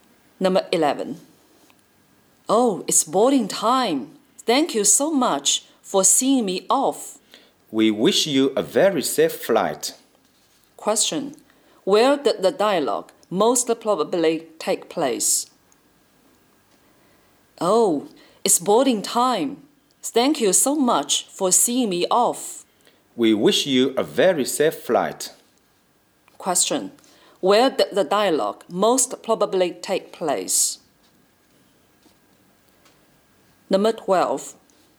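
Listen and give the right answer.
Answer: At an airport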